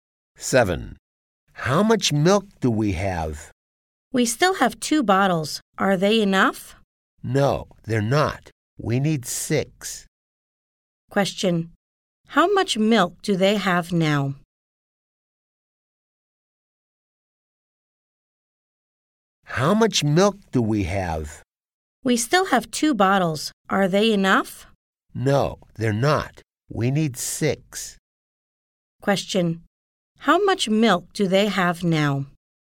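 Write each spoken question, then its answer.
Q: Question. How much milk do they have now?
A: 2 bottles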